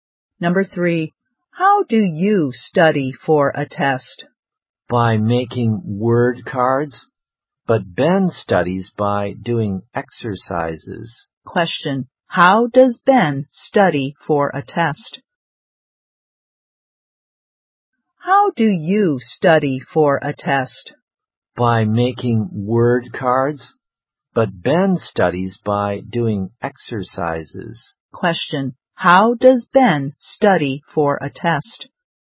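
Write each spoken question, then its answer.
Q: Question, how does Ben study for a test?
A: By doing exercises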